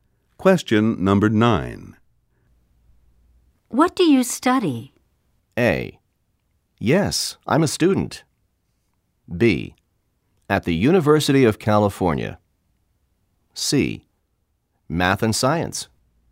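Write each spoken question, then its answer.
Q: What do you study?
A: C: Math and Science.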